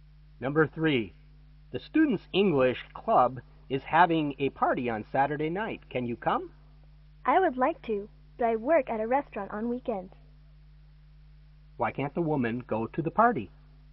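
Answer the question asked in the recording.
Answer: She works at a restaurant on weekends.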